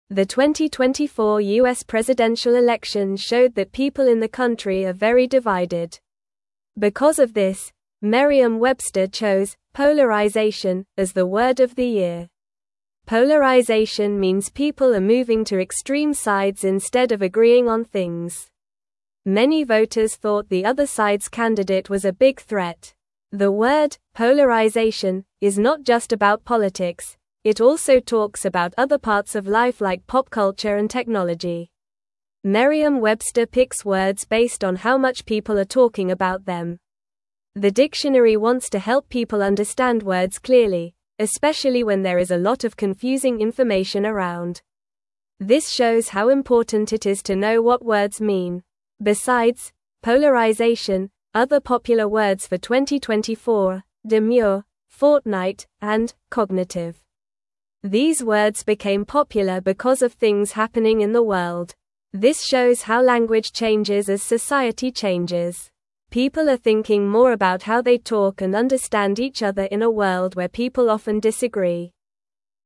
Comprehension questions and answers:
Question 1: The 2024 (1)______ presidential (2)______ showed that people in the country are very divided.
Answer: U.S.

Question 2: The 2024 (1)______ presidential (2)______ showed that people in the country are very divided.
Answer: election

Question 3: Because of this, Merriam-Webster (3)______ "polarization" as the word of the year.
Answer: chose

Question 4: The (4)______ "polarization" is not just about politics; it also talks about other parts of life like pop (5)______ and technology.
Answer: word

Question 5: The (4)______ "polarization" is not just about politics; it also talks about other parts of life like pop (5)______ and technology.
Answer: culture

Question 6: Merriam-Webster picks words based on how (6)______ people are talking about them.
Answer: much

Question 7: The dictionary (7)______ to help people understand (8)______ clearly, especially when there is a lot of confusing information around.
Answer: wants

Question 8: The dictionary (7)______ to help people understand (8)______ clearly, especially when there is a lot of confusing information around.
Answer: words

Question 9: This (9)______ how important it is to know what words mean.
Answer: shows

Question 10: These words became (10)______ because of things happening in the (11)______.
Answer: popular

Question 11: These words became (10)______ because of things happening in the (11)______.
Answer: world

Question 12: This shows how (12)______ changes as society changes.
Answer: language

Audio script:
The 2024 U.S. presidential election showed that people in the country are very divided. Because of this, Merriam-Webster chose "polarization" as the word of the year. Polarization means people are moving to extreme sides instead of agreeing on things. Many voters thought the other side's candidate was a big threat.
The word "polarization" is not just about politics; it also talks about other parts of life like pop culture and technology. Merriam-Webster picks words based on how much people are talking about them. The dictionary wants to help people understand words clearly, especially when there is a lot of confusing information around. This shows how important it is to know what words mean.
Besides "polarization," other popular words for 2024 are "demure," "fortnight," and "cognitive." These words became popular because of things happening in the world. This shows how language changes as society changes. People are thinking more about how they talk and understand each other in a world where people often disagree.

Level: Level 2